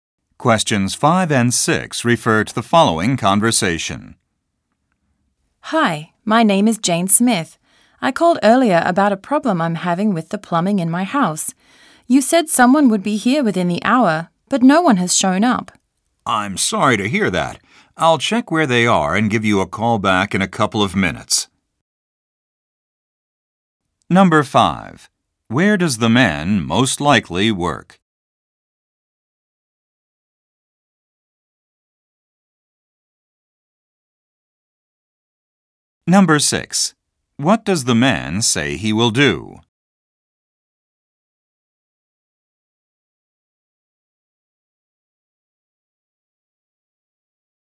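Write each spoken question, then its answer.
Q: Where does the man most likely work?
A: At a plumbing company

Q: What does the man say he will do?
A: Check where the plumbers are and call her back in a couple of minutes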